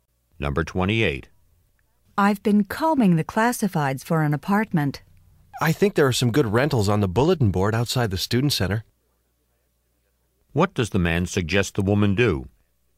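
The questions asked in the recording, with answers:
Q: What does the man suggest the woman do?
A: Look at the bulletin board outside the student center.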